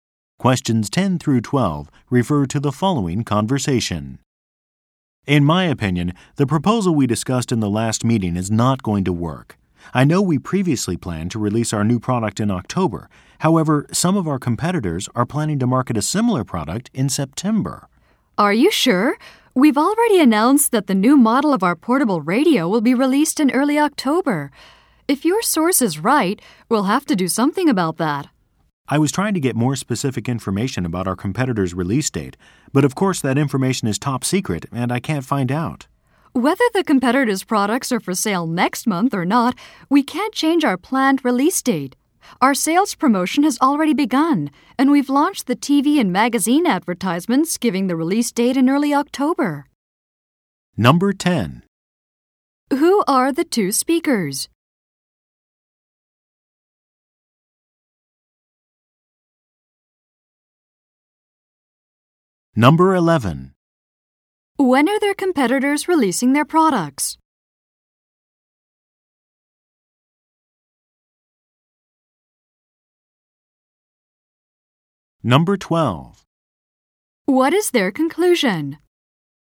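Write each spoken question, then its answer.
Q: When are their competitors releasing their products?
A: In September

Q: What is their conclusion?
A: They will not change the early October release date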